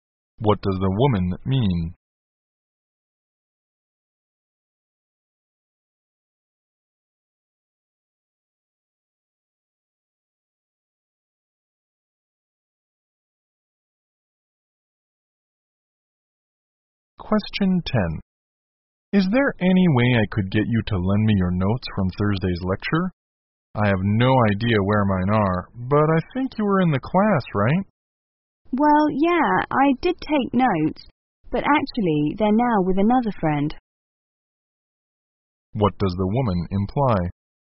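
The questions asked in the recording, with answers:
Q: What does the woman imply?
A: She can't lend her notes now because another friend has them.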